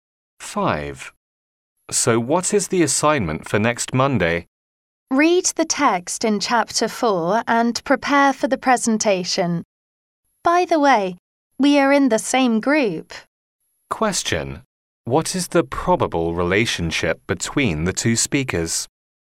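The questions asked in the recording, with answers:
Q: What is the probable relationship between the two speakers?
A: Classmates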